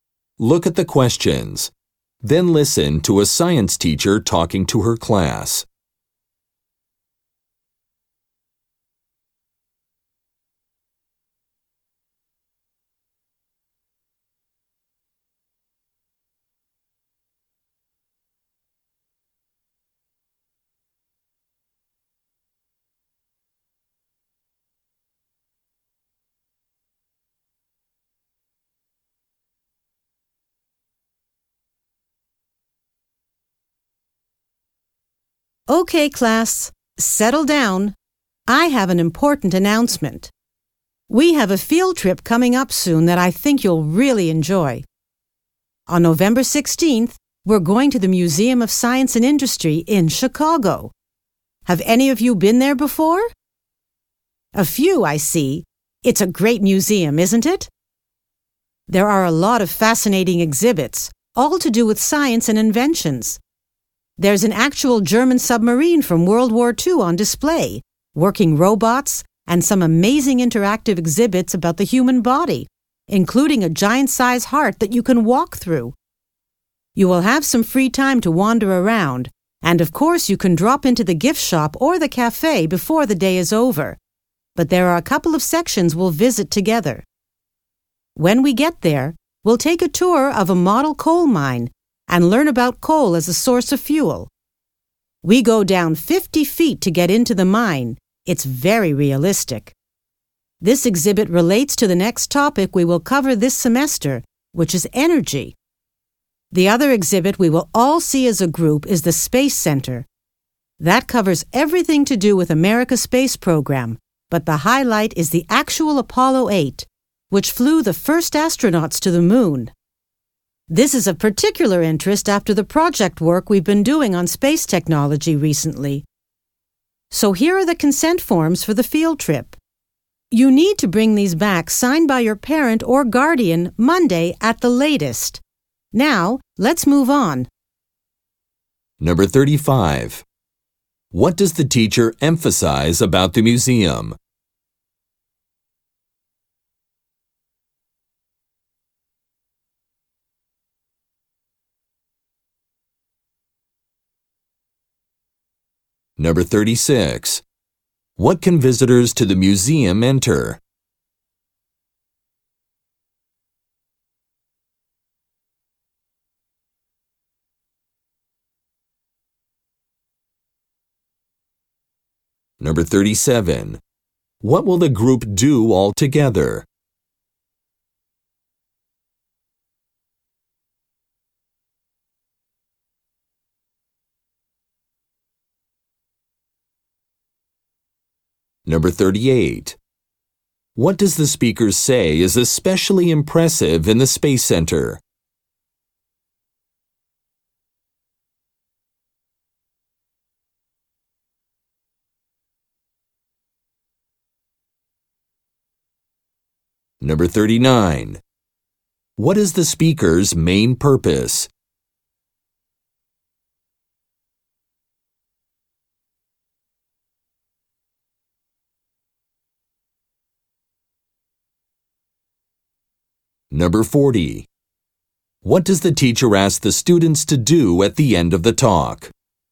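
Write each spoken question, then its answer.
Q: What will the group do all together?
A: Tour the model coal mine and the Space Center

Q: What does the speaker say is especially impressive in the Space Center?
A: The actual Apollo 8

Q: What is the speaker's main purpose?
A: To announce a field trip

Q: What does the teacher ask the students to do at the end of the talk?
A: Bring back consent forms signed by a parent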